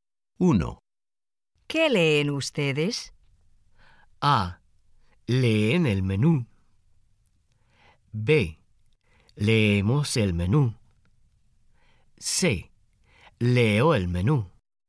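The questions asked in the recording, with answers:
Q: ¿Qué leen ustedes?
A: B: Leemos el menú.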